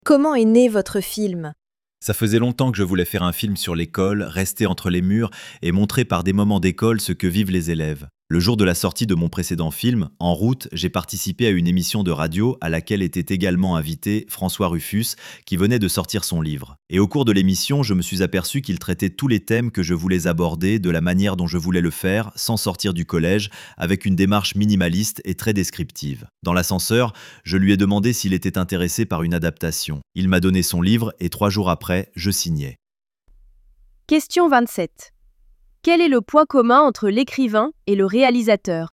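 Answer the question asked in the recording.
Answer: Ils voulaient traiter les mêmes thèmes sur l'école de la même manière.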